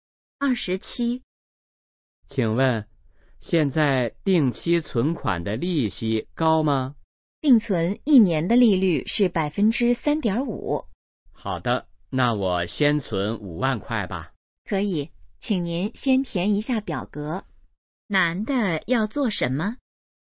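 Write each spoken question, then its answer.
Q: 男的要做什么?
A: 存款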